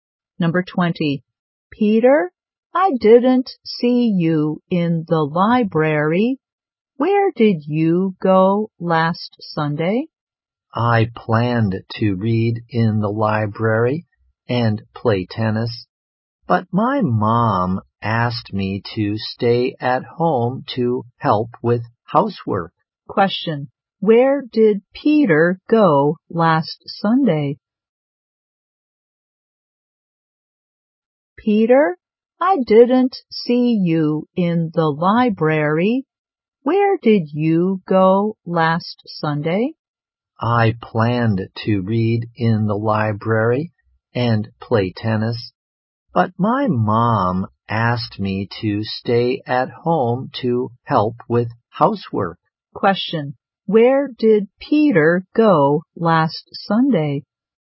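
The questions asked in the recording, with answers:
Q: Where did Peter go last Sunday?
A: He stayed at home to help with housework.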